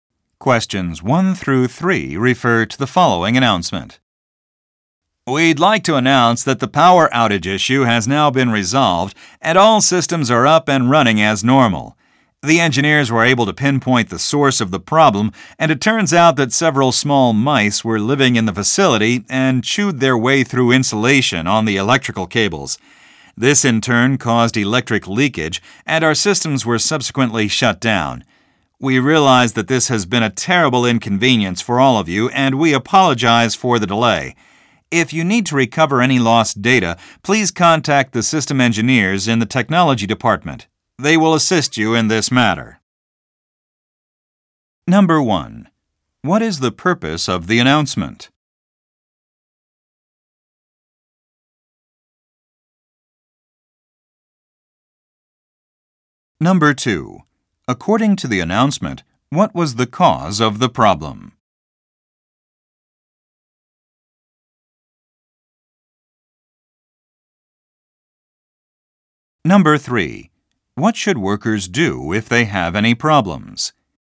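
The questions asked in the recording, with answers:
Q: What is the purpose of the announcement?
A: To report that a power outage has been resolved

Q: According to the announcement, what was the cause of the problem?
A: Mice chewed through the insulation on electrical cables

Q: What should workers do if they have any problems?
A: Contact the system engineers in the technology department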